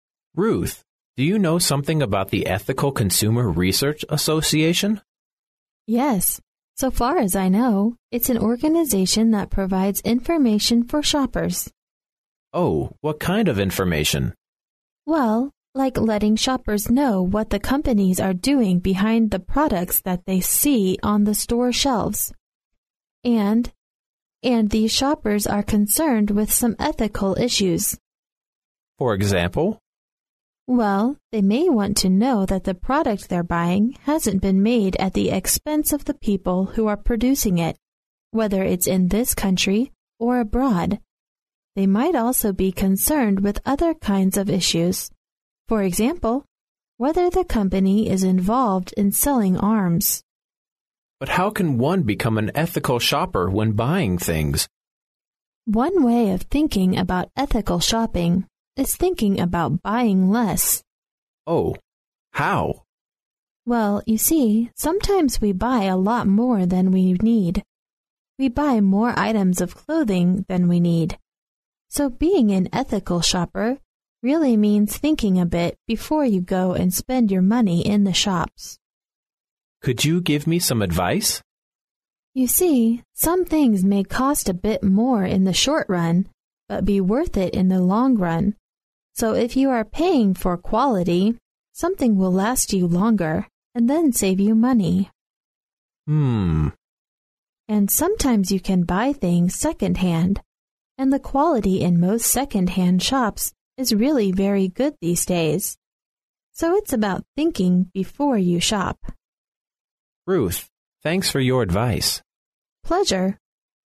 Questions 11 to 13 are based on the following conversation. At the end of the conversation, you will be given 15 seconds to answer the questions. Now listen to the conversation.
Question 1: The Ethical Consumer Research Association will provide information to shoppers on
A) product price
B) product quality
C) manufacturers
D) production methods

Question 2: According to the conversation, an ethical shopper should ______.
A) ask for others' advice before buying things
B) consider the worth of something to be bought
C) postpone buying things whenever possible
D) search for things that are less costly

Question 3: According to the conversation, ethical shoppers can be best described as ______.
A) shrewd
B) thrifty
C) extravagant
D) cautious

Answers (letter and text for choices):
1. C) manufacturers
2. B) consider the worth of something to be bought
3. B) thrifty

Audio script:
[听力原文] M: Ruth, do you know something about the Ethical Consumer Research Association? W: Yes, so far as I know, it's an organization that provides information for shoppers. M: Oh, what kind of information? W: Well, like letting shoppers know what the companies are doing behind the products that they see on the store shelves. And...and these shoppers are concerned with some ethical issues. M: For example? W: Well, they may want to know that the product they're buying hasn't been made at the expense of the people who are producing it, whether it's in this country or abroad. They might also be concerned with other kinds of issues: for example, whether the company is involved in selling arms. M: But how can one become an ethical shopper when buying things? W: One way of thinking about ethical shopping is thinking about buying less. M: Oh, how? W: Well, you see, sometimes we buy a lot more than we need. We buy more items of clothing than we need. So being an ethical shopper really means thinking a bit before you go and spend your money in the shops. M: Could you give me some advice? W: You see, some things may cost a bit more in the short-run, but be worth it in the long-run. So, if you are paying for quality, something will last you longer and then save you money. W: And sometimes you can buy things second-hand, and the quality in most second-hand shops is really very good these days. So it's about thinking before you shop. M: Ruth, thanks for your advice. W: Pleasure.